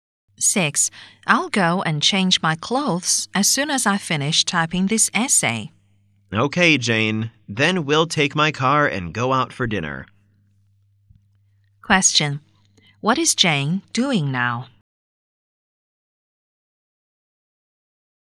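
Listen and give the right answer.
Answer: Typing an essay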